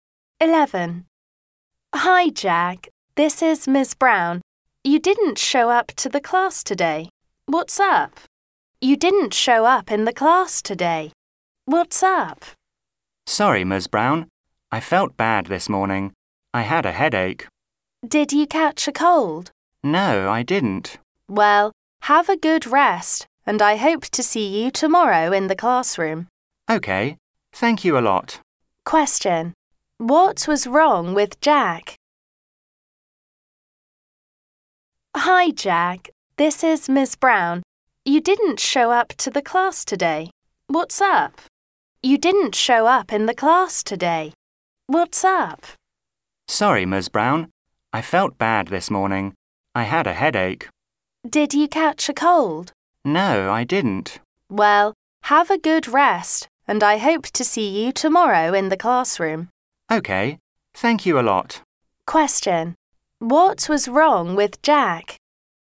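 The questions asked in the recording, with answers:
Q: What was wrong with Jack?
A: He had a headache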